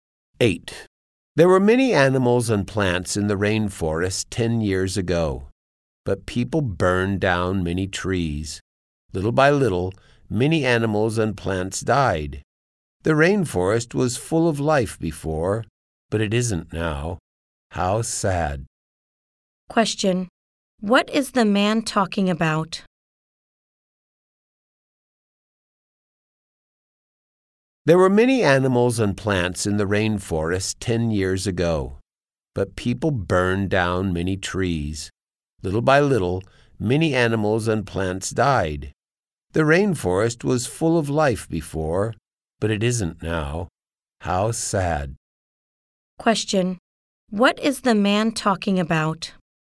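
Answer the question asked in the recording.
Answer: The rainforest losing its animals and plants because people burned trees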